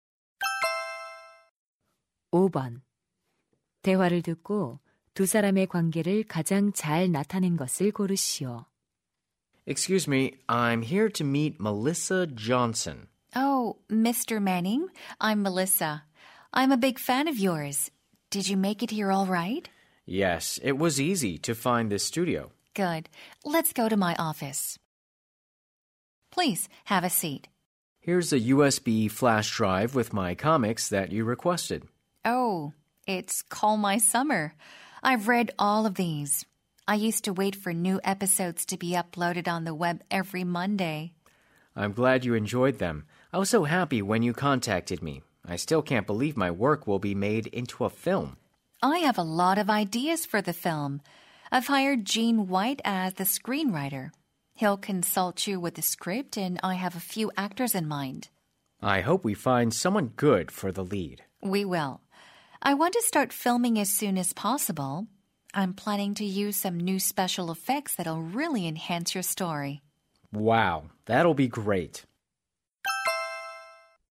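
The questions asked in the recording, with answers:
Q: 대화를 듣고 두 사람의 관계를 가장 잘 나타낸 것을 고르시오.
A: 영화감독 – 웹툰 작가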